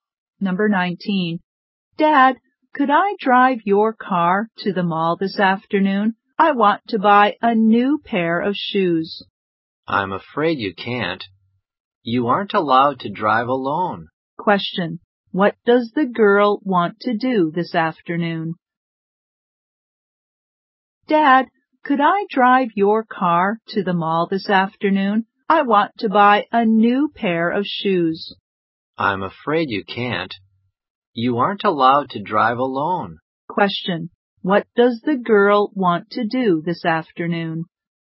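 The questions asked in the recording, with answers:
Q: What does the girl want to do this afternoon?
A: Buy a new pair of shoes at the mall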